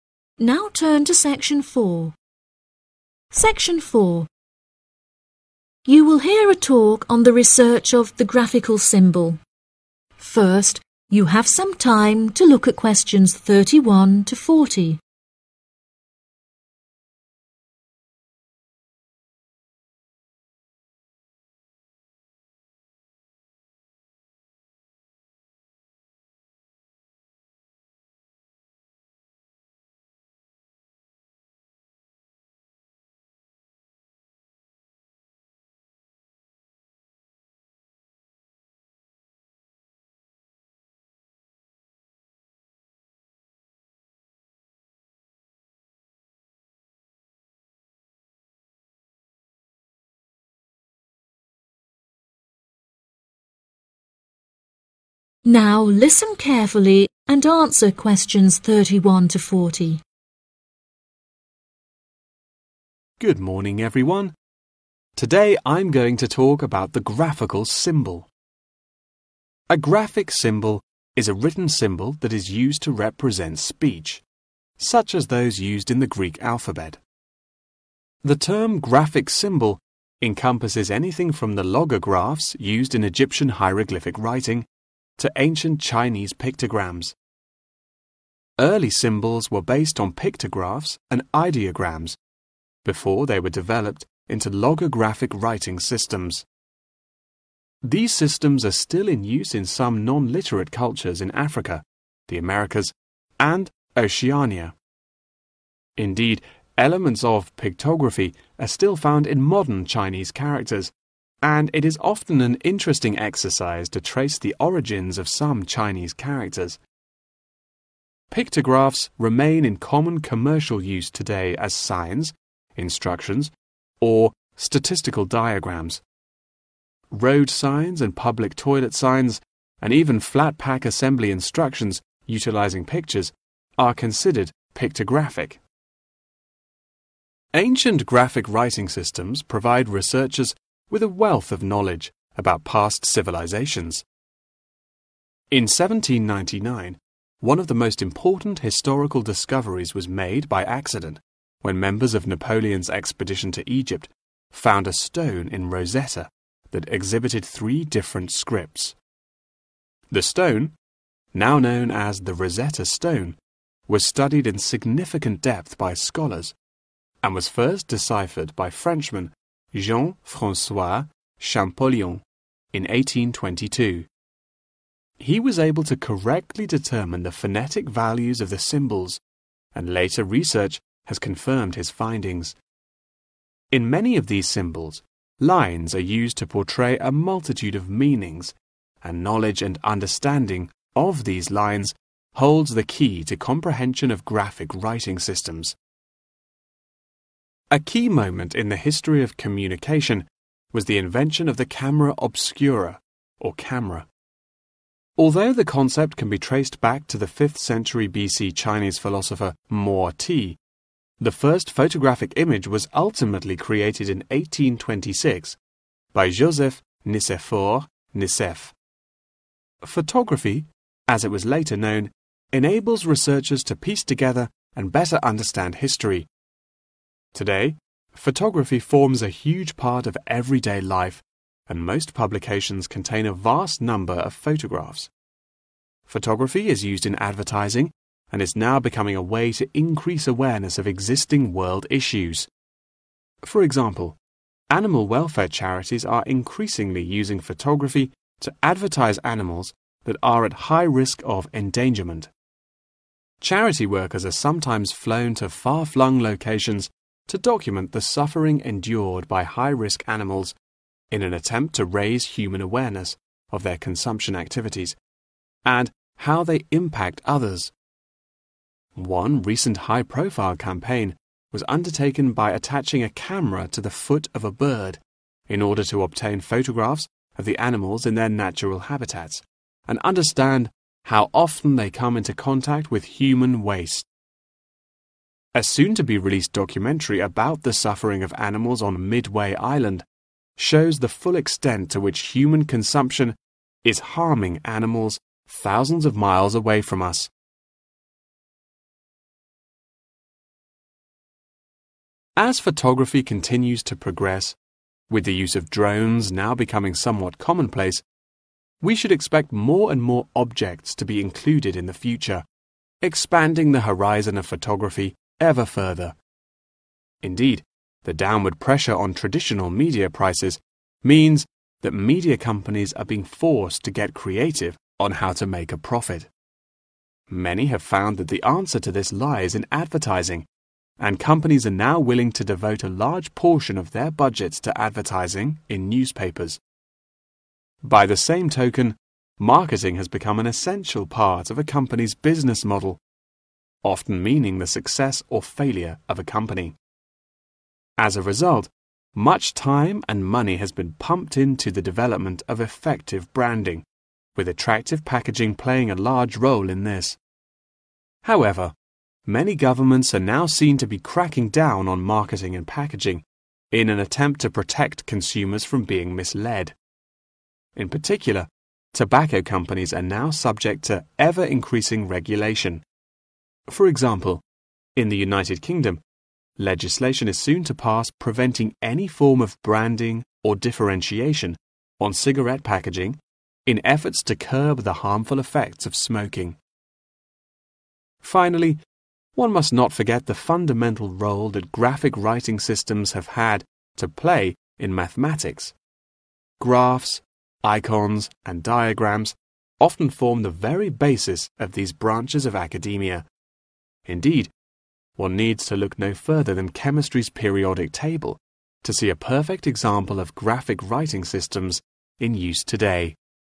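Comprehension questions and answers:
Write ONE WORD ONLY for each answer.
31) still has something to do with 31. use today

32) Researchers obtain a wide range of 32. about past civilisations.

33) In those symbols, 33. are used to depict various meanings.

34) 34. helps people understand history better.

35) Some charities will 35. many endangered species.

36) A camera was tied to one 36. of a bird.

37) More 37. will be included in the future with the development of photography.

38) Companies would like to invest a lot to advertise in 38. .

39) Designing appealing 39. is used as a way of effective branding.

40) Graphic writing systems are of great importance in the subject of 40.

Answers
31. commercial
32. knowledge
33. lines
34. Photography
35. advertise
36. foot
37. objects
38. newspapers
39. packaging
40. mathematics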